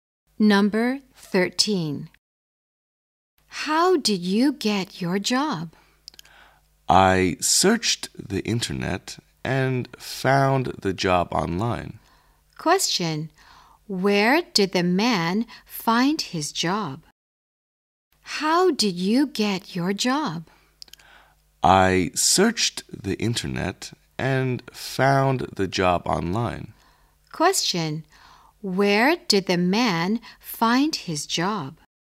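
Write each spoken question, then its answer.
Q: Where did the man find his job?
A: Online, on the internet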